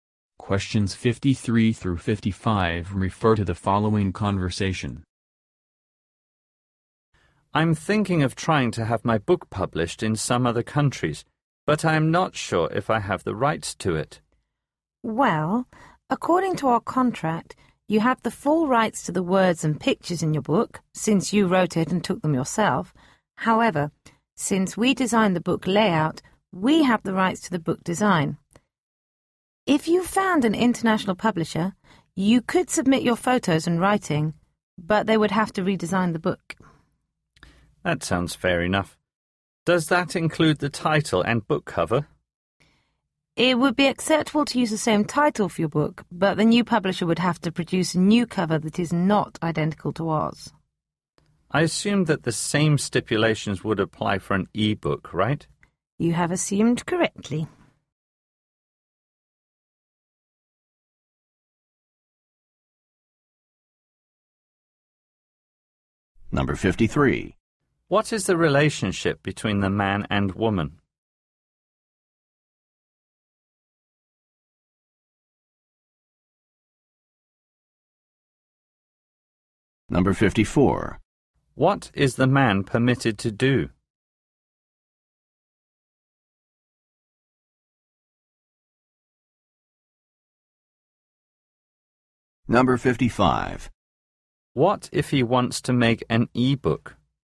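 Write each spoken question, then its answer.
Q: What is the relationship between the man and woman?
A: Author and publisher

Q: What is the man permitted to do?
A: Use his words, photos and title with another publisher, with a new design and cover

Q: What if he wants to make an e-book?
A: The same conditions apply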